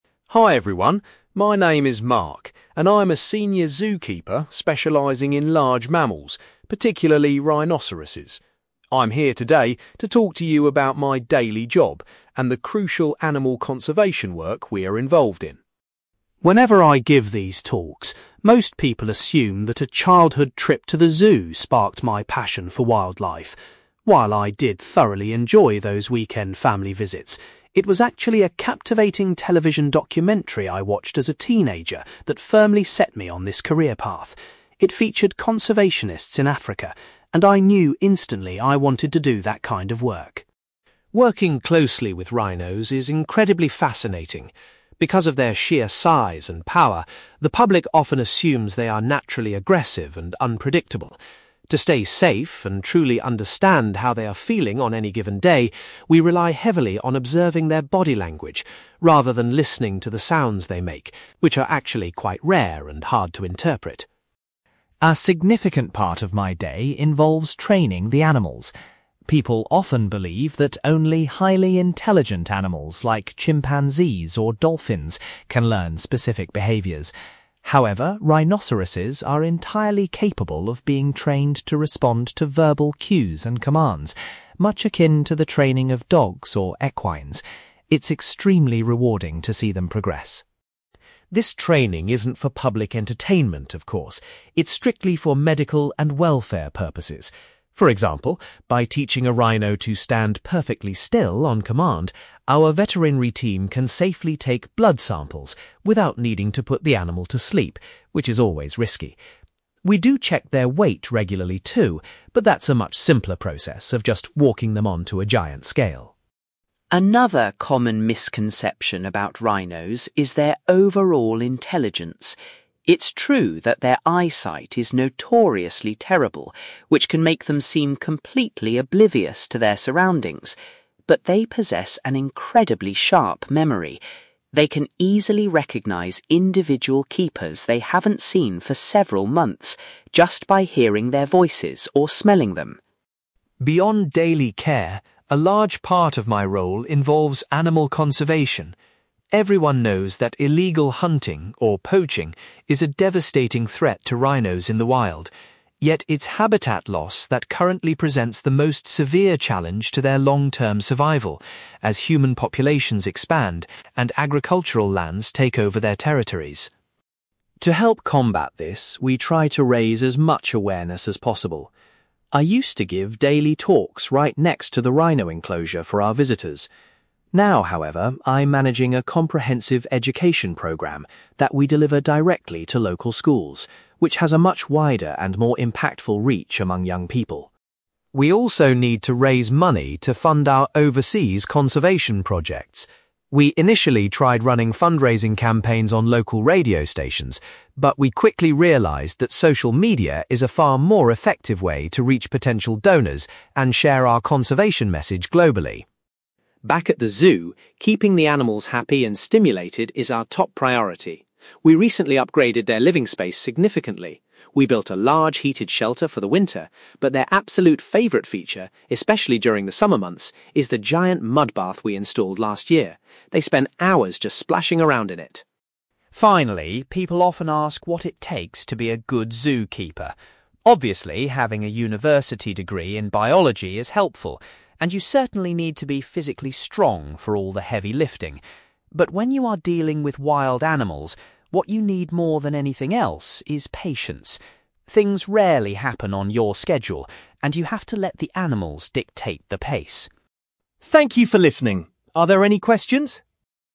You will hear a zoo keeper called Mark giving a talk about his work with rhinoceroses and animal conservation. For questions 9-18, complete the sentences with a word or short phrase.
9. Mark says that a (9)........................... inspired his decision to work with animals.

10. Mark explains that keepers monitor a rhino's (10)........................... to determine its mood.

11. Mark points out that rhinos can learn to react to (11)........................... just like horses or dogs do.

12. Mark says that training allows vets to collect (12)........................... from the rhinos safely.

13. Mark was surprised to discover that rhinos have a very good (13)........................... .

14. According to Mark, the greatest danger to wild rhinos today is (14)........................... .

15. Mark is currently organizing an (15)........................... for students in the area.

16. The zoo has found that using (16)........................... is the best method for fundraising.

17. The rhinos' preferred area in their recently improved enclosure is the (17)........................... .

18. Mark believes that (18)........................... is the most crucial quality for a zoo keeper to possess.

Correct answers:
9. television documentary
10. body language
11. verbal cues
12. blood samples
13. memory
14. habitat loss
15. education programme
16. social media
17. mud bath
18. patience

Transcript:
Mark: Hi everyone, my name is Mark, and I'm a senior zoo keeper specialising in large mammals, particularly rhinoceroses. I'm here today to talk to you about my daily job and the crucial animal conservation work we are involved in.
Whenever I give these talks, most people assume that a childhood trip to the zoo sparked my passion for wildlife. While I did thoroughly enjoy those weekend family visits, it was actually a captivating television documentary I watched as a teenager that firmly set me on this career path. It featured conservationists in Africa, and I knew instantly I wanted to do that kind of work.
Working closely with rhinos is incredibly fascinating. Because of their sheer size and power, the public often assumes they are naturally aggressive and unpredictable. To stay safe and truly understand how they are feeling on any given day, we rely heavily on observing their body language, rather than listening to the sounds they make, which are actually quite rare and hard to interpret.
A significant part of my day involves training the animals. People often believe that only highly intelligent animals like chimpanzees or dolphins can learn specific behaviors. However, rhinoceroses are entirely capable of being trained to respond to verbal cues and commands, much akin to the training of dogs or equines. It's extremely rewarding to see them progress.
This training isn't for public entertainment, of course. It's strictly for medical and welfare purposes. For example, by teaching a rhino to stand perfectly still on command, our veterinary team can safely take blood samples without needing to put the animal to sleep, which is always risky. We do check their weight regularly too, but that's a much simpler process of just walking them onto a giant scale.
Another common misconception about rhinos is their overall intelligence. It's true that their eyesight is notoriously terrible, which can make them seem completely oblivious to their surroundings. But they possess an incredibly sharp memory. They can easily recognize individual keepers they haven't seen for several months, just by hearing their voices or smelling them.
Beyond daily care, a large part of my role involves animal conservation. Everyone knows that illegal hunting, or poaching, is a devastating threat to rhinos in the wild. Yet, it's habitat loss that currently presents the most severe challenge to their long-term survival, as human populations expand and agricultural lands take over their territories.
To help combat this, we try to raise as much awareness as possible. I used to give daily talks right next to the rhino enclosure for our visitors. Now, however, I'm managing a comprehensive education programme that we deliver directly to local schools, which has a much wider and more impactful reach among young people.
We also need to raise money to fund our overseas conservation projects. We initially tried running fundraising campaigns on local radio stations, but we quickly realized that social media is a far more effective way to reach potential donors and share our conservation message globally.
Back at the zoo, keeping the animals happy and stimulated is our top priority. We recently upgraded their living space significantly. We built a large heated shelter for the winter, but their absolute favorite feature, especially during the summer months, is the giant mud bath we installed last year. They spend hours just splashing around in it!
Finally, people often ask what it takes to be a good zoo keeper. Obviously, having a university degree in biology is helpful, and you certainly need to be physically strong for all the heavy lifting. But when you are dealing with wild animals, what you need more than anything else is patience. Things rarely happen on your schedule, and you have to let the animals dictate the pace.
Thank you for listening. Are there any questions?

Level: B2